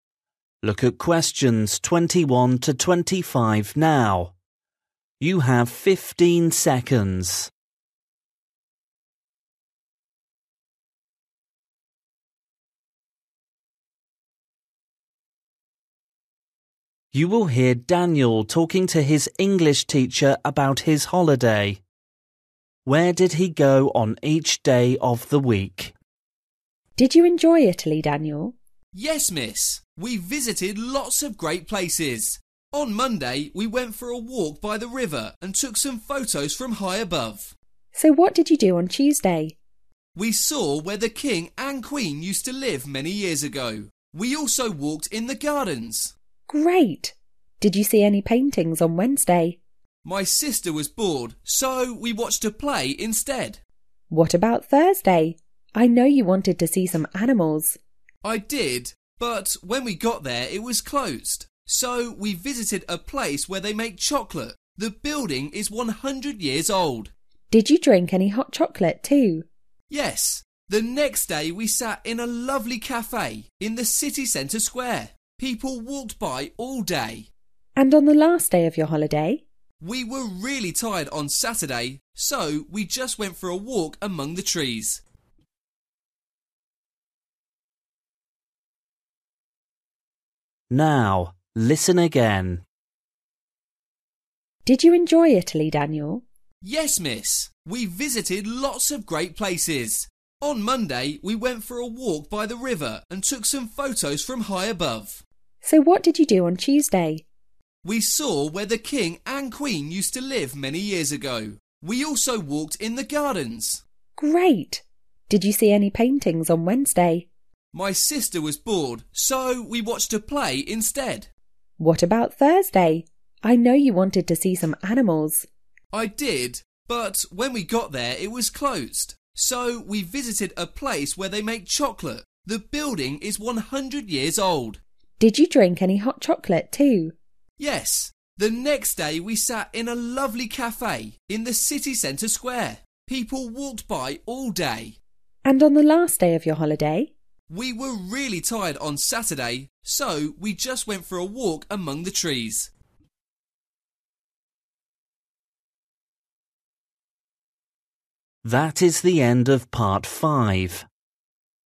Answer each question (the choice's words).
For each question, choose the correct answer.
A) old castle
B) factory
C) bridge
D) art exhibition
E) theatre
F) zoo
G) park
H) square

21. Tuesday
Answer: old castle

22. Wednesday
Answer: theatre

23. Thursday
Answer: factory

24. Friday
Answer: square

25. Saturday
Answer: park

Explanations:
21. We saw where the king and queen used to live many years ago. We also walked in the gardens.
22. we watched a play instead.
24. the next day we sat in a lovely café in the city centre square. People walked by all day.
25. we just went for a walk among the trees.

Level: KET (A2)